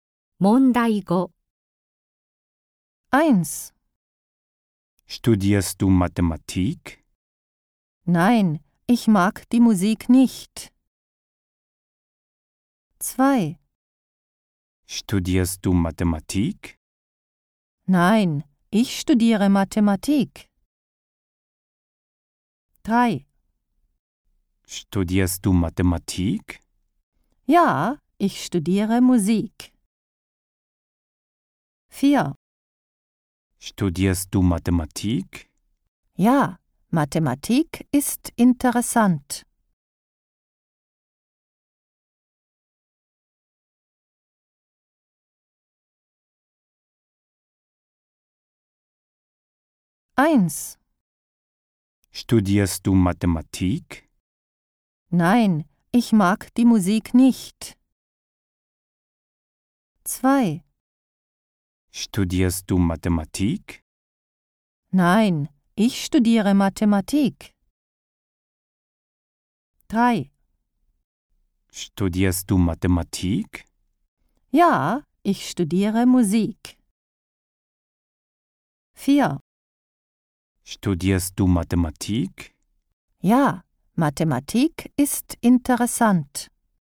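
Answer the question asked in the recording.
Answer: 4: Ja, Mathematik ist interessant.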